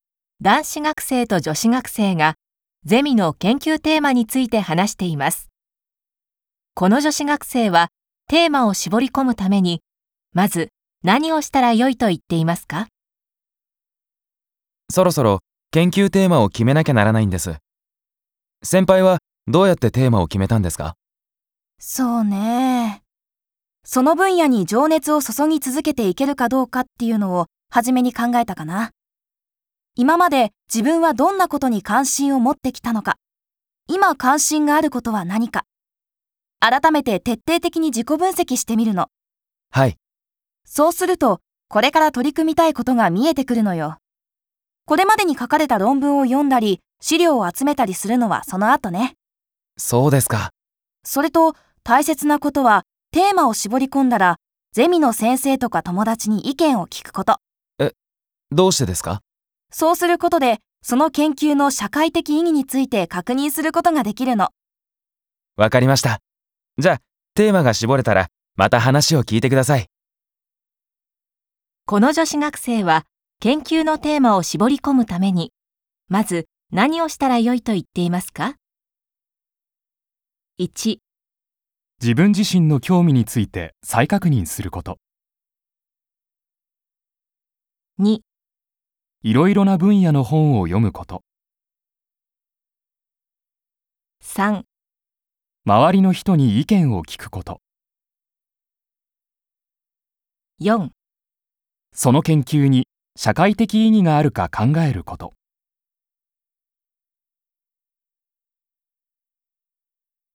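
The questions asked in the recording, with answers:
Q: この女子学生は研究のテーマを絞り込むためにまず何をしたらよいと言っていますか?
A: 1: 自分自身の興味について再確認すること。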